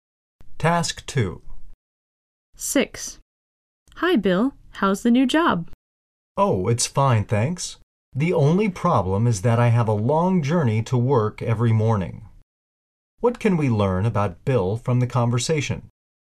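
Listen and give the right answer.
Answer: He has a long journey to work every morning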